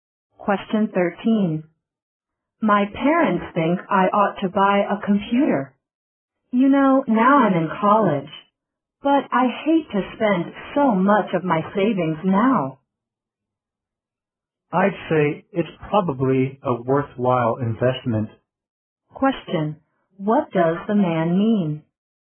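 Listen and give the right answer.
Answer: Buying a computer is a worthwhile investment.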